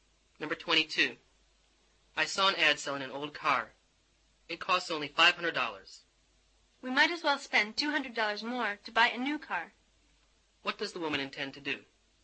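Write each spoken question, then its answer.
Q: What does the woman intend to do?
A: Buy a new car.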